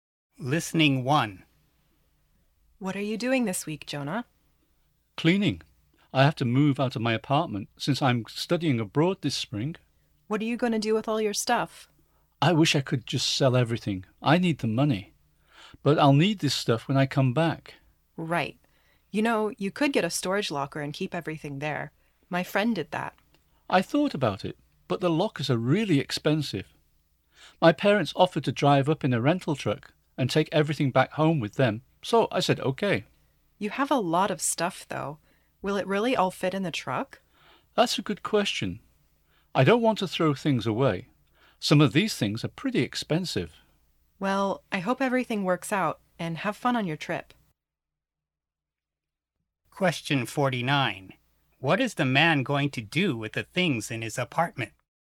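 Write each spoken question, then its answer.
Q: What is the man going to do with the things in his apartment?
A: His parents will take them back home in a rental truck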